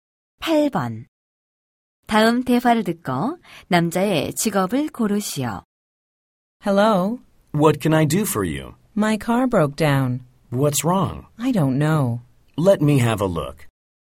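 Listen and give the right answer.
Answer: 자동차 정비사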